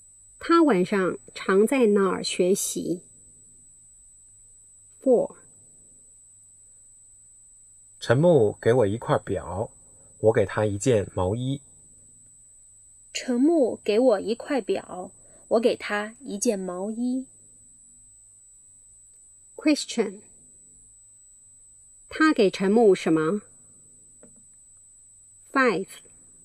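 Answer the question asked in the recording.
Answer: 一件毛衣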